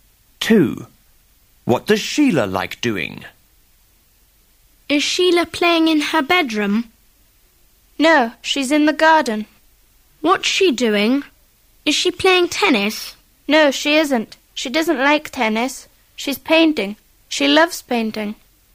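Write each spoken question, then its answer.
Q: What does Sheila like doing?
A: Painting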